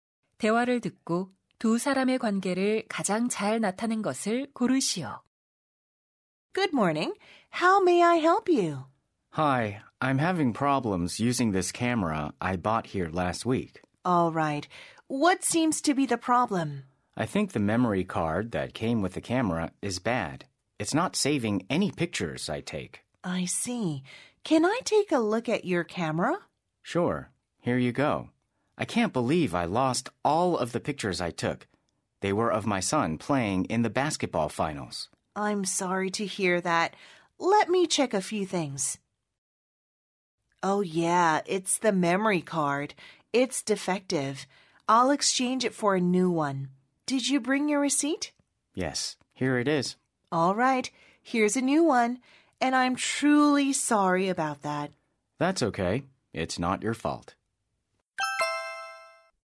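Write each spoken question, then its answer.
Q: 대화를 듣고 두 사람의 관계를 가장 잘 나타낸 것을 고르시오.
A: 카메라 매장 직원 - 고객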